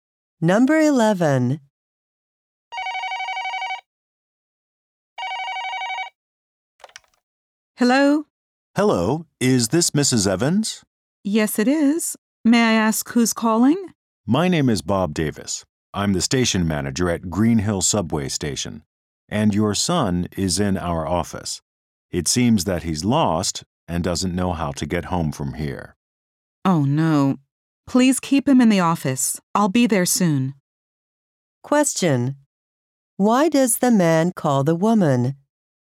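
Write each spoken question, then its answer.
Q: Why does the man call the woman?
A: Her son is lost and is at the subway station office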